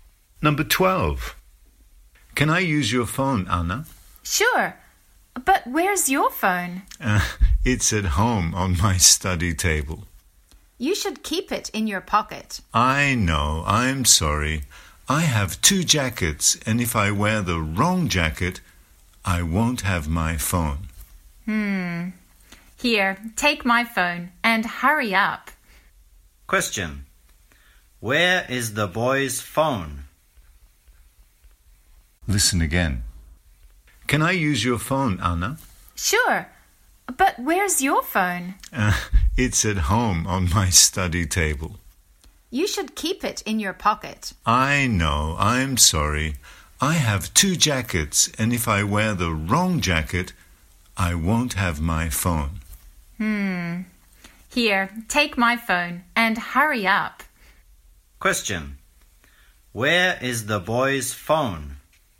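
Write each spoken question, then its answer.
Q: Where is the boy's phone?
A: At home on his study table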